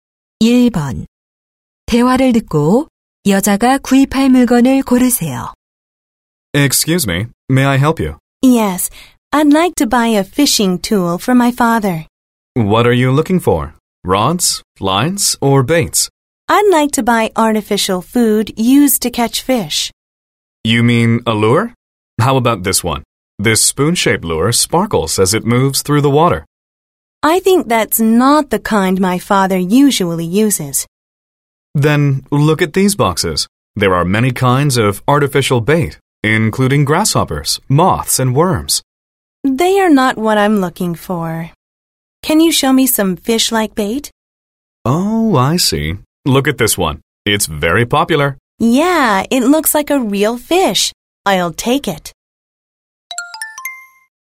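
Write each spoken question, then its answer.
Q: 대화를 듣고 여자가 구입할 물건을 고르세요.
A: 물고기 모양의 인조 미끼(루어)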